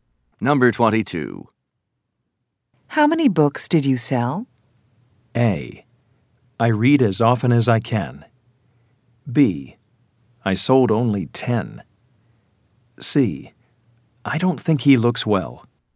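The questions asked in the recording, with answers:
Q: How many books did you sell?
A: B: I sold only 10.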